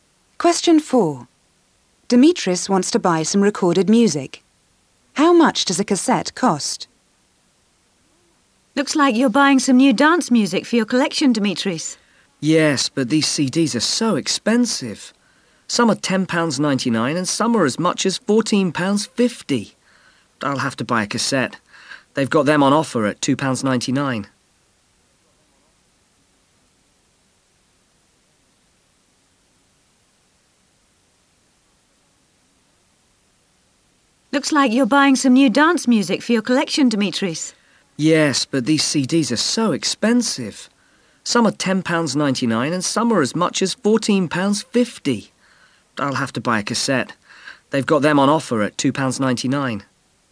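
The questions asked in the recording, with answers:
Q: How much does a cassette cost?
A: £2.99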